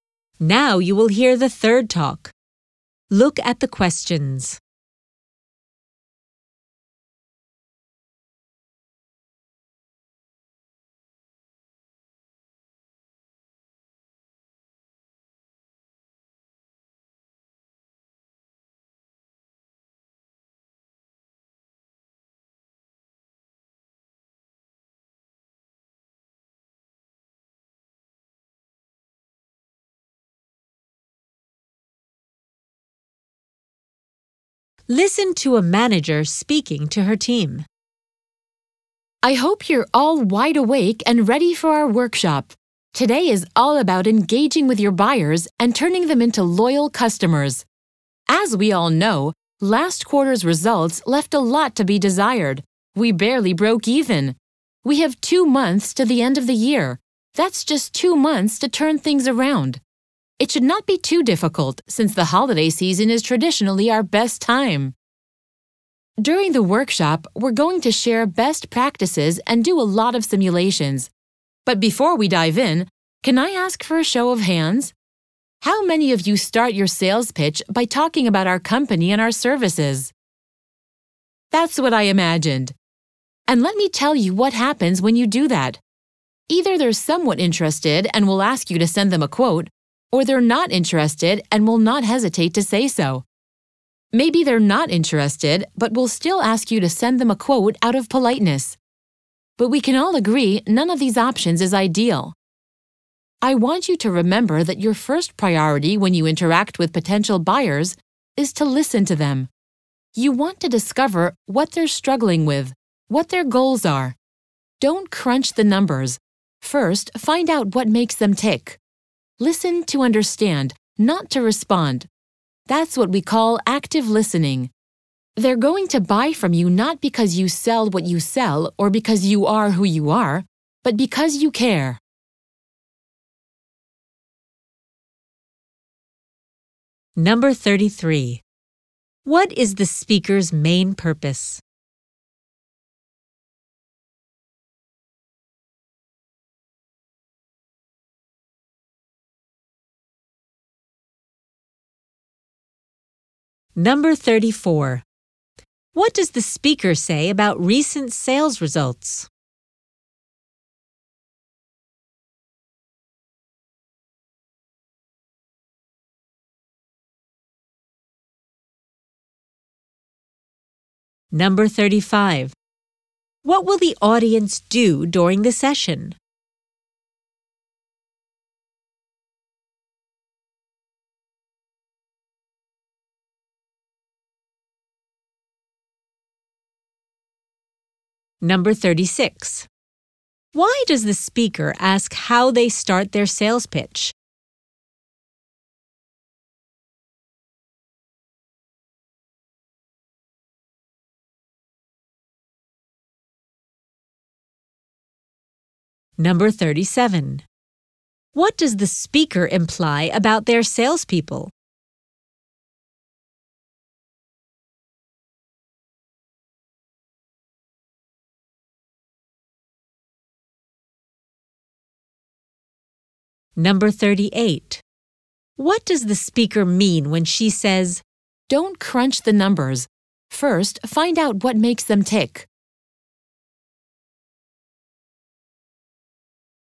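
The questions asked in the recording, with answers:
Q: What is the speaker's main purpose?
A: To start a workshop on engaging buyers and building loyal customers

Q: What does the speaker say about recent sales results?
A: They barely broke even; results were disappointing

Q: What will the audience do during the session?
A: Share best practices and do simulations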